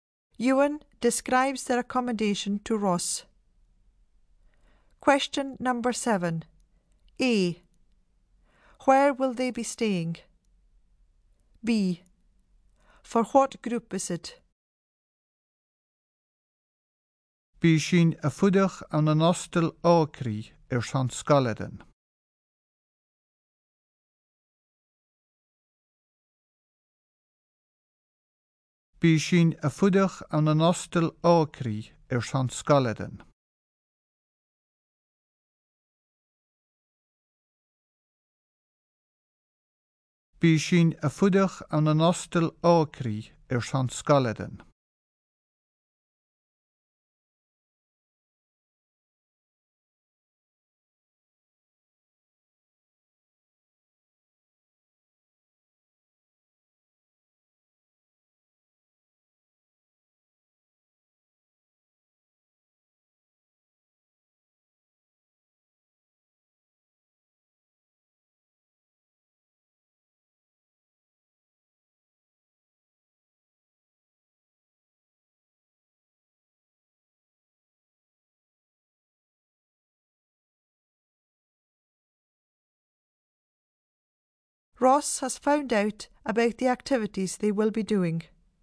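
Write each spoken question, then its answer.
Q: A. Where will they be staying?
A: In a hostel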